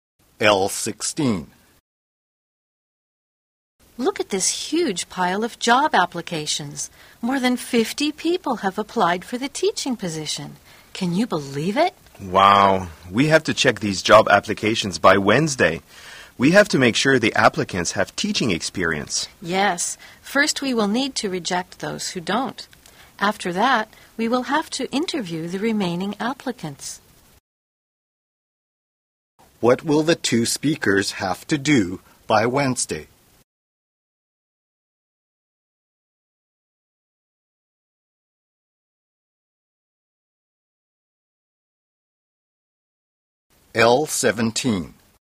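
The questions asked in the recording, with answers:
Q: What will the two speakers have to do by Wednesday?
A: Check the job applications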